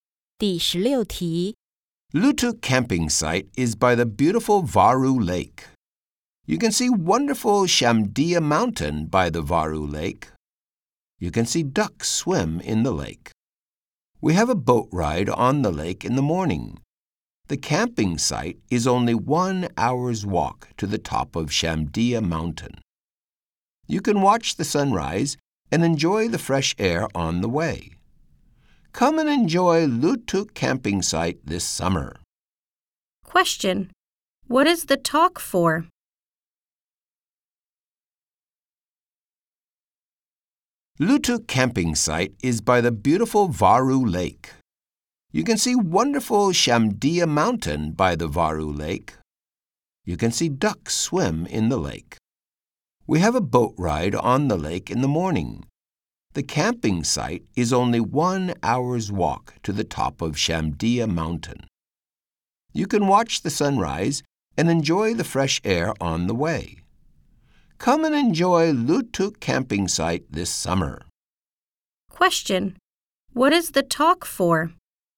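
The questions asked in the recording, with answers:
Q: Question: What is the talk for?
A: To advertise Lutuk Camping Site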